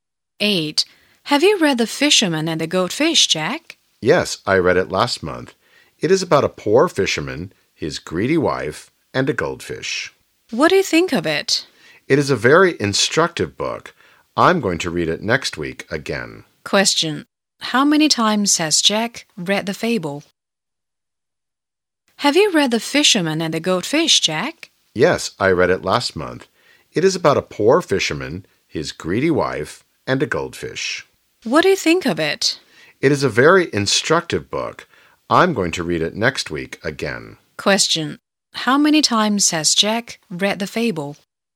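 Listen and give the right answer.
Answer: Once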